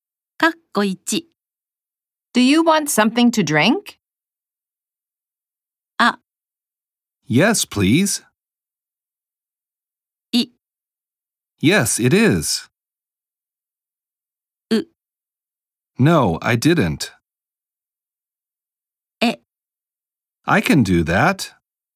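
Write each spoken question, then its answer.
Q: Do you want something to drink?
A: あ: Yes, please.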